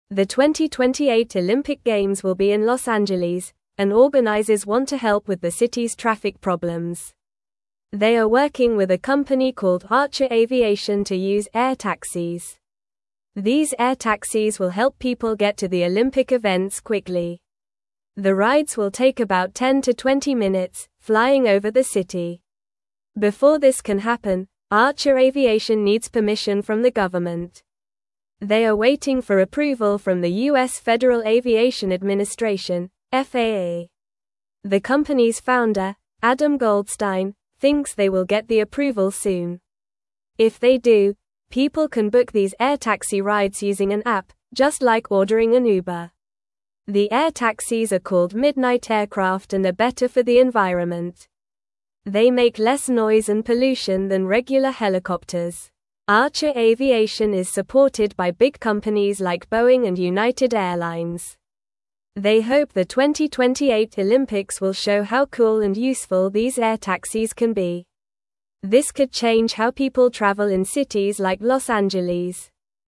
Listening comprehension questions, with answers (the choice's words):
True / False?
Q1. The air taxis are not called Midnight aircraft and are not better for the environment.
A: False

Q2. Archer Aviation is not the company working on air taxis.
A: False

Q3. The 2028 Olympic Games will not take place in Los Angeles.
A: False

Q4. The rides in air taxis will not take about 10 to 20 minutes.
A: False

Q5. People can book air taxi rides using an app.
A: True

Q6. Organizers want to help with traffic problems in the city.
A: True

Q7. Archer Aviation needs permission from the government to use air taxis.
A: True

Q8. Air taxis will help people get to Olympic events quickly.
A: True

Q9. Where will the 2028 Olympic Games be held?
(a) New York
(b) Chicago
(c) Los Angeles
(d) San Francisco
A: Los Angeles

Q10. What type of transportation are organizers planning to use for the Olympics?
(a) Air taxis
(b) Buses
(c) Trains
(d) Cars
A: Air taxis

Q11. Who is working with the Olympic organizers on air taxis?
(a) Boeing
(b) Archer Aviation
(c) United Airlines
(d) Uber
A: Archer Aviation

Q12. How long will the air taxi rides take?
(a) 30-40 minutes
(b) 5-10 minutes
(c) 15-25 minutes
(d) 10-20 minutes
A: 10-20 minutes

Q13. What does Archer Aviation need from the government?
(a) Money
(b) Drivers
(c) Buildings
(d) Permission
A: Permission

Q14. What is the name of the air taxis?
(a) Sky taxis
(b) City flyers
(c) Midnight aircraft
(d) Fast planes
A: Midnight aircraft

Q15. What do the air taxis do better than regular helicopters?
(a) Fly faster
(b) Make less noise and pollution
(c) Carry more people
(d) Cost less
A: Make less noise and pollution

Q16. Who supports Archer Aviation?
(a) Big companies like Boeing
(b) Small businesses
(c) Local shops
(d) Schools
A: Big companies like Boeing

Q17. The 2028 Olympic Games will be in Los (1)______, and organizers want to help with the city's traffic problems.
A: Angeles

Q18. They are (2)______ with a company (3)______ Archer Aviation to use air taxis.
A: working

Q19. They are (2)______ with a company (3)______ Archer Aviation to use air taxis.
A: called

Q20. The rides will take about 10-20 (4)______, flying over the city.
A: minutes

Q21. Before this can happen, Archer Aviation needs (5)______ from the government.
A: permission

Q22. They are waiting for approval from the (6)______ Federal Aviation Administration (FAA).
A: U.S.

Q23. If they do, people can (7)______ these air taxi (8)______ using an app, just like ordering an Uber.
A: book

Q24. If they do, people can (7)______ these air taxi (8)______ using an app, just like ordering an Uber.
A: rides

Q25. They make (9)______ noise and pollution than regular helicopters.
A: less

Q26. Archer Aviation is supported by big companies like Boeing and United (10)______.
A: Airlines

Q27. They hope the 2028 Olympics will (11)______ how cool and (12)______ these air taxis can be.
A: show

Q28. They hope the 2028 Olympics will (11)______ how cool and (12)______ these air taxis can be.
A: useful

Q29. Where will the 2028 Olympic Games take place?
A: The 2028 Olympic Games will take place in Los Angeles.

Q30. What company is working with Los Angeles to help with traffic?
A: The company working with Los Angeles to help with traffic is Archer Aviation.

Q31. How long will the air taxi rides take to get to the Olympic events?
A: The air taxi rides will take about 10-20 minutes.

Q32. What do people need to get before they can use the air taxis?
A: People need to get permission from the government to use the air taxis.

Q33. What is the name of the air taxis that Archer Aviation is making?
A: The air taxis that Archer Aviation is making are called Midnight aircraft.

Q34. Why are the Midnight aircraft better for the environment?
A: The Midnight aircraft are better for the environment because they make less noise and pollution.

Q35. Which big companies support Archer Aviation?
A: Big companies like Boeing and United Airlines support Archer Aviation.

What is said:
The 2028 Olympic Games will be in Los Angeles, and organizers want to help with the city's traffic problems. They are working with a company called Archer Aviation to use air taxis. These air taxis will help people get to the Olympic events quickly. The rides will take about 10-20 minutes, flying over the city.
Before this can happen, Archer Aviation needs permission from the government. They are waiting for approval from the U.S. Federal Aviation Administration (FAA). The company's founder, Adam Goldstein, thinks they will get the approval soon. If they do, people can book these air taxi rides using an app, just like ordering an Uber.
The air taxis are called Midnight aircraft and are better for the environment. They make less noise and pollution than regular helicopters. Archer Aviation is supported by big companies like Boeing and United Airlines. They hope the 2028 Olympics will show how cool and useful these air taxis can be. This could change how people travel in cities like Los Angeles.

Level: Level 2